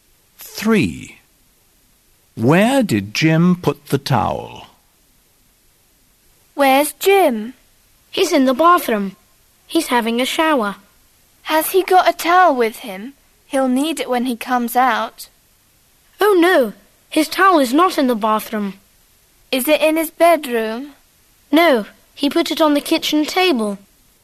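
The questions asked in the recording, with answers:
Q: Where did Jim put the towel?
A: On the kitchen table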